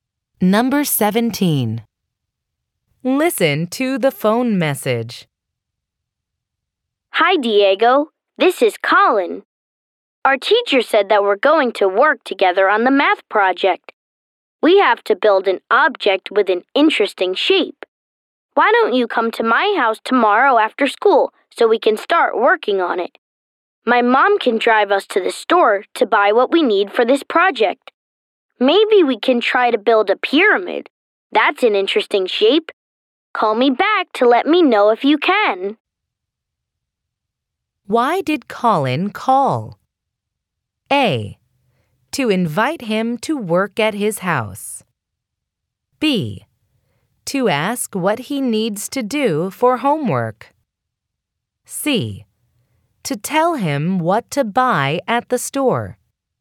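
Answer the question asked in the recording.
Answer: A: To invite him to work at his house.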